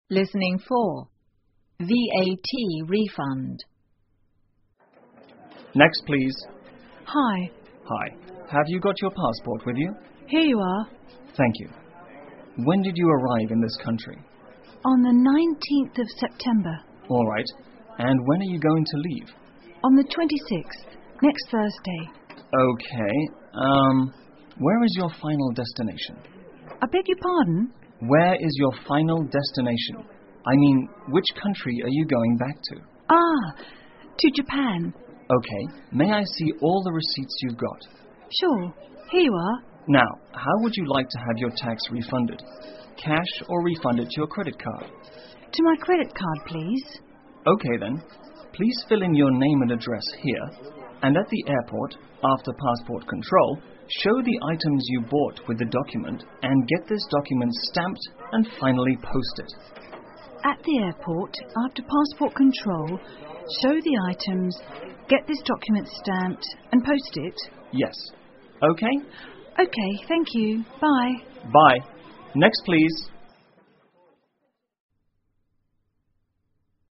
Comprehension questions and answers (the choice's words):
请根据对话内容,选出一个正确的答案。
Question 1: What would the woman like to do?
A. To go through customs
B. To claim tax back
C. To pay taxes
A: To claim tax back

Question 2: When did the woman arrive in this country?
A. On the 19th of September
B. On the 26th of September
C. Thursday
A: On the 19th of September

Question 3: When will the woman leave this country?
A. On the 19th of September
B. Next Thursday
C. Not stated in the conversation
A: Next Thursday

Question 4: Was the tax refunded on the spot?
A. Yes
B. No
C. Not stated in the conversation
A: No

请根据对话内容回答问题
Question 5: What is the woman asked to show?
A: Passport and (all the) receipts

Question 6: Where is the woman's destination?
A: Japan

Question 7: How will the tax get refunded?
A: To her credit card